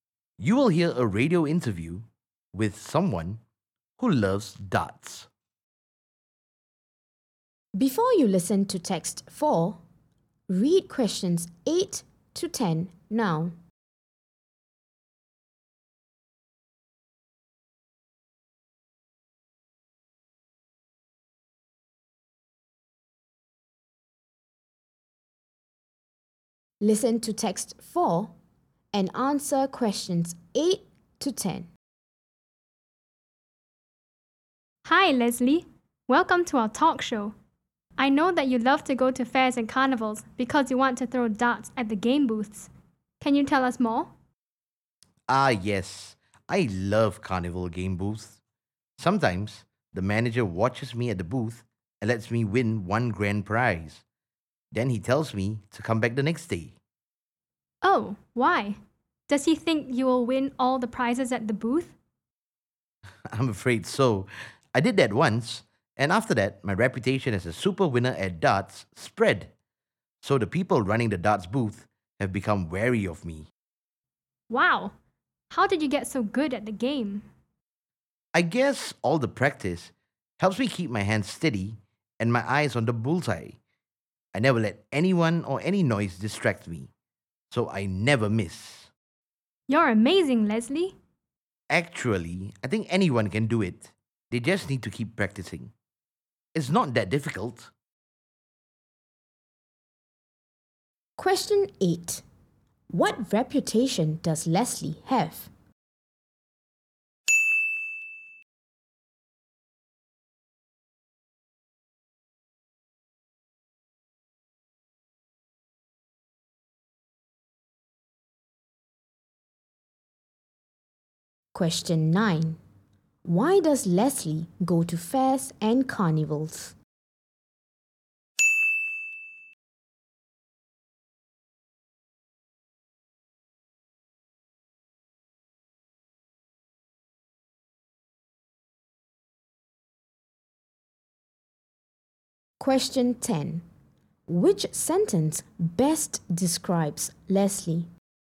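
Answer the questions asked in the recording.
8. A super winner at darts
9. To throw darts at the game booths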